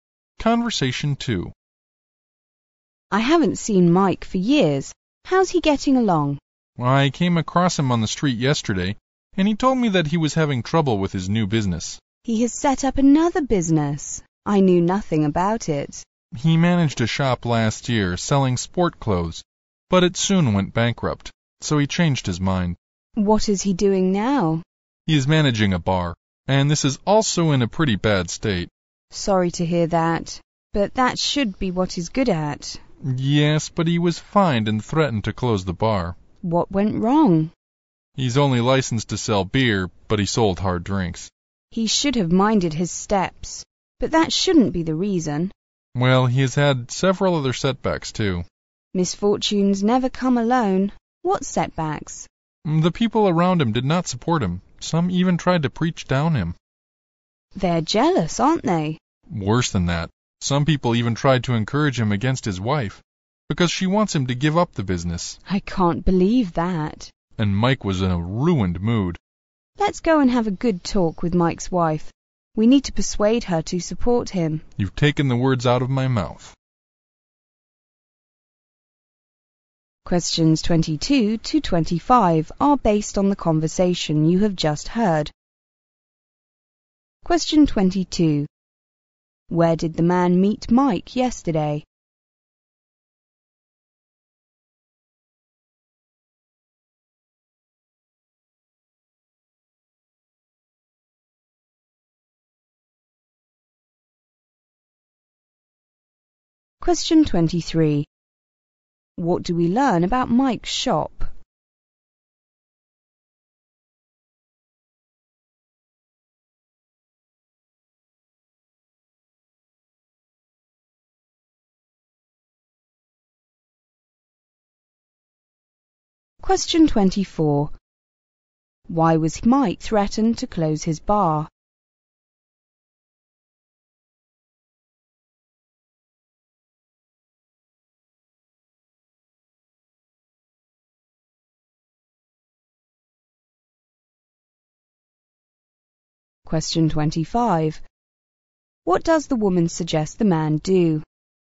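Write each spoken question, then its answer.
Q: Where did the man meet Mike yesterday?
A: On the street.

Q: What do we learn about Mike's shop?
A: It sold sports clothes and went bankrupt.

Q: Why was Mike threatened to close his bar?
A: He sold hard drinks when licensed only to sell beer.

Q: What does the woman suggest the man do?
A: Go and talk with Mike's wife to persuade her to support him.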